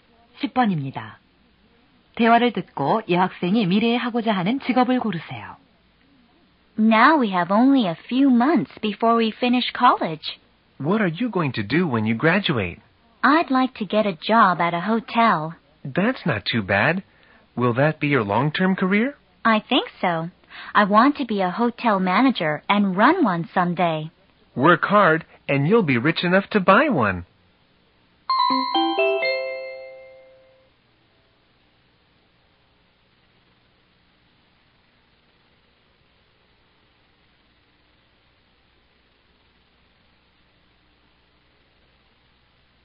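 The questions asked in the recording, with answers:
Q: 대화를 듣고 여학생이 미래에 하고자 하는 직업을 고르세요.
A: 호텔 지배인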